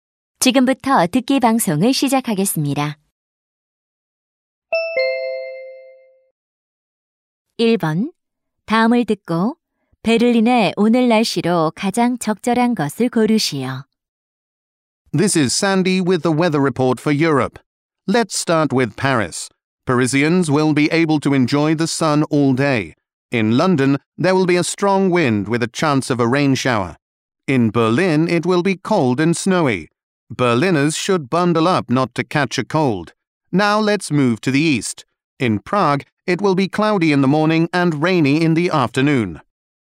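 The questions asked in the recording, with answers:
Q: 다음을 듣고 베를린의 오늘 날씨로 가장 적절한 것을 고르시오.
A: 춥고 눈이 옴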